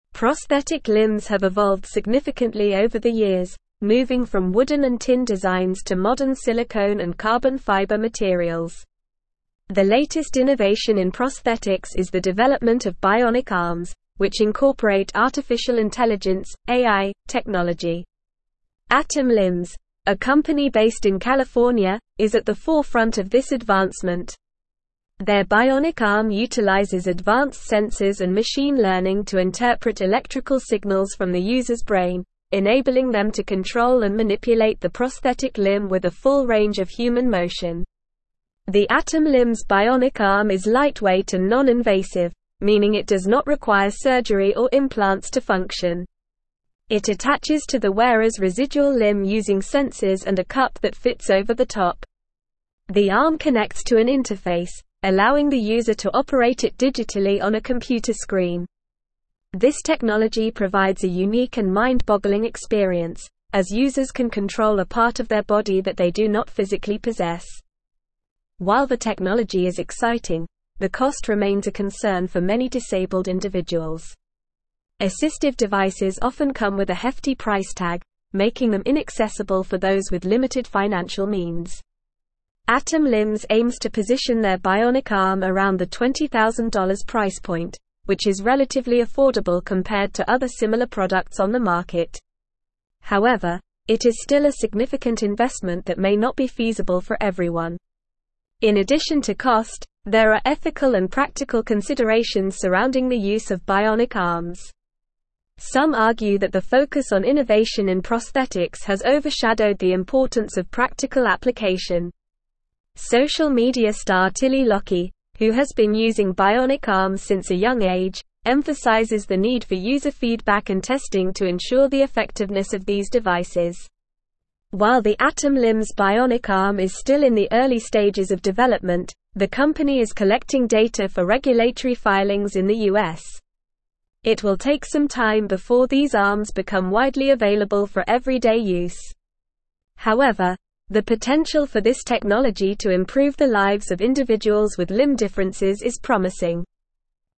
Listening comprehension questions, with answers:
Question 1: The (1)______ innovation in prosthetics is the development of bionic arms, which incorporate artificial intelligence (AI) technology.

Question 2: Their bionic arm utilizes advanced (2)______ and machine learning to interpret electrical signals from the user's (3)______, (4)______ them to control and manipulate the prosthetic limb with a full range of (5)______ motion.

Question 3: Their bionic arm utilizes advanced (2)______ and machine learning to interpret electrical signals from the user's (3)______, (4)______ them to control and manipulate the prosthetic limb with a full range of (5)______ motion.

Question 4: Their bionic arm utilizes advanced (2)______ and machine learning to interpret electrical signals from the user's (3)______, (4)______ them to control and manipulate the prosthetic limb with a full range of (5)______ motion.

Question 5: Their bionic arm utilizes advanced (2)______ and machine learning to interpret electrical signals from the user's (3)______, (4)______ them to control and manipulate the prosthetic limb with a full range of (5)______ motion.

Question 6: It (6)______ to the wearer's residual limb using sensors and a cup that fits over the top.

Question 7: The arm (7)______ to an interface, allowing the user to operate it digitally on a computer screen.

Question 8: This (8)______ provides a unique and mind-boggling experience, as users can control a part of their body that they do not physically possess.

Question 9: Assistive devices often come with a hefty (9)______ tag, making them inaccessible for those with (10)______ financial means.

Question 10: Assistive devices often come with a hefty (9)______ tag, making them inaccessible for those with (10)______ financial means.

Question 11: However, it is still a significant investment that may not be (11)______ for everyone.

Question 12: Some (12)______ that the focus on innovation in prosthetics has overshadowed the importance of practical application.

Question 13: Social media star Tilly Lockey, who has been using bionic arms since a young age, emphasizes the need for user feedback and testing to ensure the effectiveness of these (13)______.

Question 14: While the Atom (14)______ bionic arm is still in the early stages of development, the company is collecting data for regulatory filings in the US.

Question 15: It will take some time before these arms become widely (15)______ for everyday use.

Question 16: However, the (16)______ for this technology to improve the lives of individuals with limb differences is promising.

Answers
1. latest
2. sensors
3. brain
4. enabling
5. human
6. attaches
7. connects
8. technology
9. price
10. limited
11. feasible
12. argue
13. devices
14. Limbs
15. available
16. potential

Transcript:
Prosthetic limbs have evolved significantly over the years, moving from wooden and tin designs to modern silicone and carbon fiber materials. The latest innovation in prosthetics is the development of bionic arms, which incorporate artificial intelligence (AI) technology. Atom Limbs, a company based in California, is at the forefront of this advancement. Their bionic arm utilizes advanced sensors and machine learning to interpret electrical signals from the user's brain, enabling them to control and manipulate the prosthetic limb with a full range of human motion.
The Atom Limbs bionic arm is lightweight and non-invasive, meaning it does not require surgery or implants to function. It attaches to the wearer's residual limb using sensors and a cup that fits over the top. The arm connects to an interface, allowing the user to operate it digitally on a computer screen. This technology provides a unique and mind-boggling experience, as users can control a part of their body that they do not physically possess.
While the technology is exciting, the cost remains a concern for many disabled individuals. Assistive devices often come with a hefty price tag, making them inaccessible for those with limited financial means. Atom Limbs aims to position their bionic arm around the $20,000 price point, which is relatively affordable compared to other similar products on the market. However, it is still a significant investment that may not be feasible for everyone.
In addition to cost, there are ethical and practical considerations surrounding the use of bionic arms. Some argue that the focus on innovation in prosthetics has overshadowed the importance of practical application. Social media star Tilly Lockey, who has been using bionic arms since a young age, emphasizes the need for user feedback and testing to ensure the effectiveness of these devices.
While the Atom Limbs bionic arm is still in the early stages of development, the company is collecting data for regulatory filings in the US. It will take some time before these arms become widely available for everyday use. However, the potential for this technology to improve the lives of individuals with limb differences is promising.

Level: Level 4